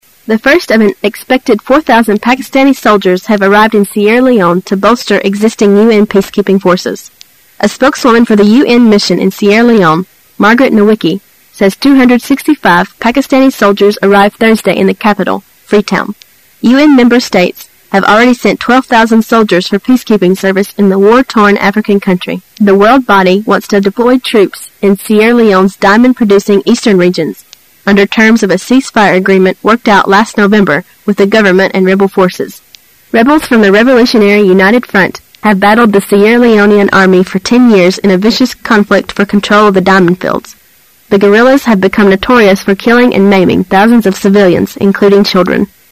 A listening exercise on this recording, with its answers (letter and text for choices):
Questions 28 to 30 are based on the following news. At the end of the news item, you will be given 15 seconds to answer the questions. Now listen to the news.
What have the guerrilas become notorious for?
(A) Breaking the cease-fire agreement.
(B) Killing and maiming thousands of civilians.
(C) Destroying a building.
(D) Robbing a bank.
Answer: (B) Killing and maiming thousands of civilians.

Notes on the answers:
[解析] 本题是细节题。 [详细解答] 新闻中最后一句话,即可判断B为正确答案。

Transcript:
[解析] 28-30 The first of an expected 4,000 Pakistani soldiers have arrived in Sierra Leone to bolster existing U. peacekeeping forces. A spokeswoman for the U. mission in Sierra Leone, Margaret Nowicki, says 265 Pakistani soldiers arrived Thursday in the capital, Freetown. member states have already sent 12,000 soldiers for peacekeeping service in the war-torn African country. The world body wants to deploy troops in Sierra Leone's diamond-producing eastern regions, under terms of a cease-fire agreement worked out last November with the government and rebel forces. Rebels from the Revolutionary United Front have battled the Sierra Leonean Army for 10 years in a vicious conflict for control of the diamond fields.